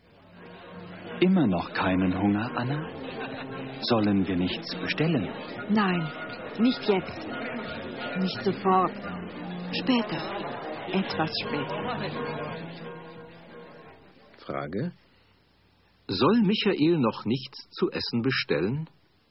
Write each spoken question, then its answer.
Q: Frage. Soll Michael noch nichts zu essen bestellen?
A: Nein, er soll noch nichts zu essen bestellen.